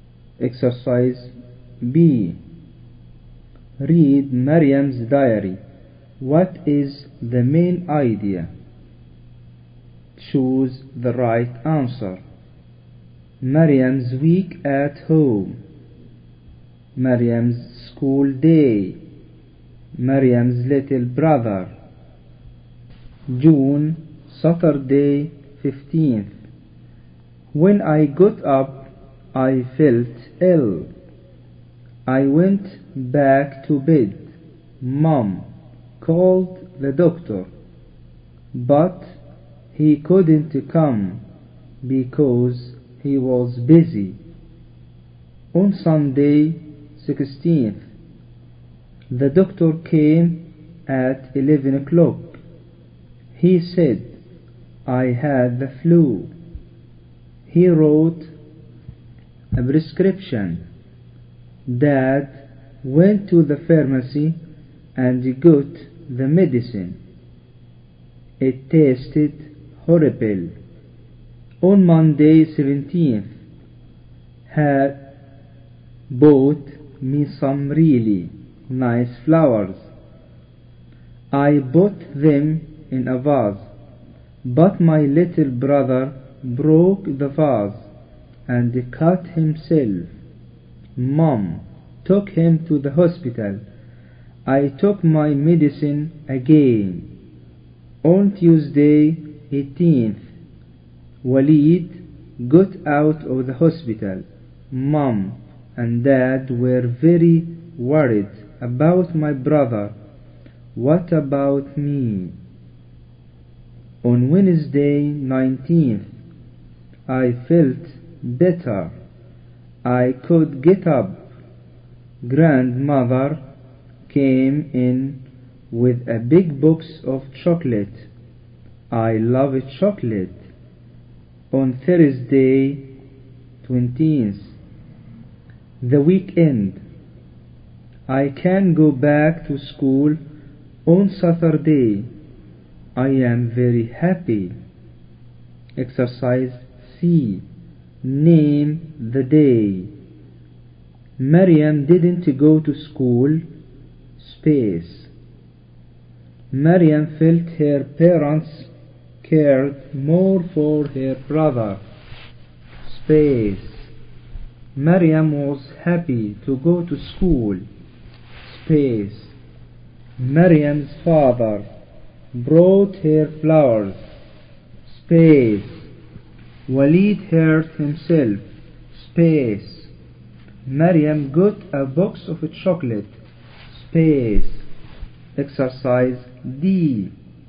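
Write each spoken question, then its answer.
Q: What is the main idea? Choose the right answer.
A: Maryam's week at home

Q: Mariam felt her parents cared more for her brother.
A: Tuesday

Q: Mariam was happy to go to school.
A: Thursday

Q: Mariam's father brought her flowers.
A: Monday

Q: Waleed hurt himself.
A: Monday

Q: Mariam got a box of chocolate.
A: Wednesday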